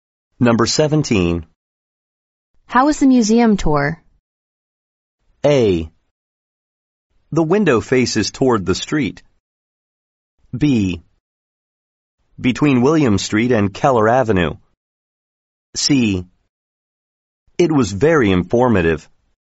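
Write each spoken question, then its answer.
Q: How was the museum tour?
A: C: It was very informative.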